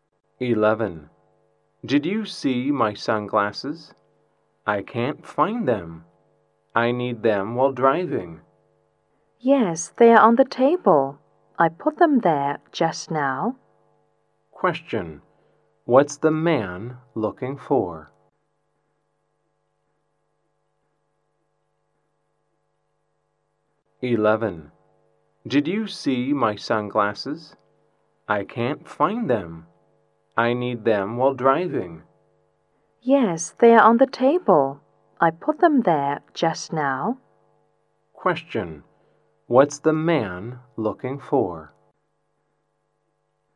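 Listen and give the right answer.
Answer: His sunglasses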